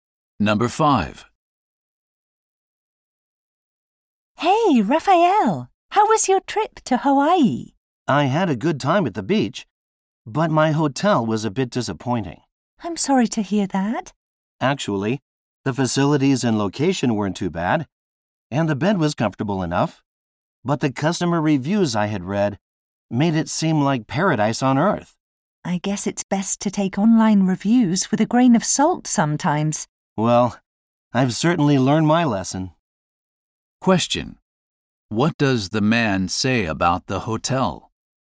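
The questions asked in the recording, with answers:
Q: What does the man say about the hotel?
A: It did not live up to the online reviews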